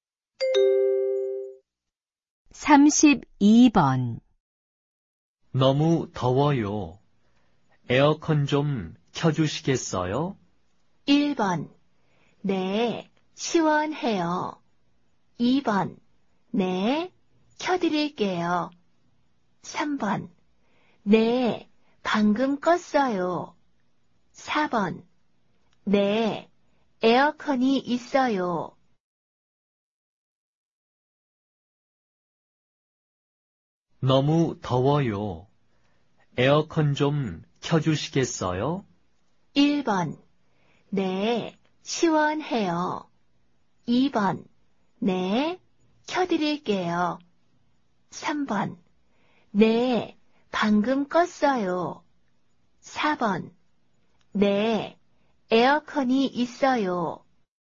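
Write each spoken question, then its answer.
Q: 너무 더워요. 에어컨 좀 켜주시겠어요?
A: 2: 네, 켜드릴게요.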